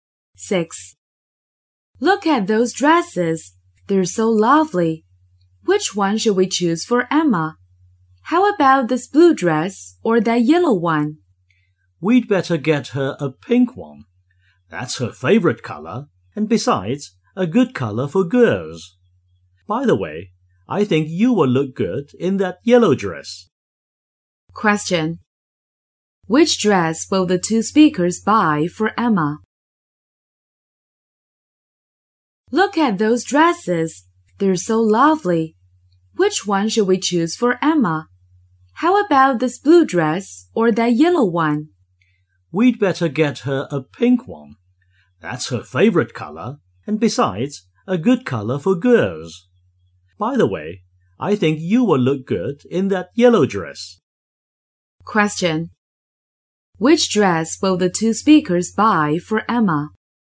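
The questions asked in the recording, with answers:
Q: Which dress will the two speakers buy for Emma?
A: A pink dress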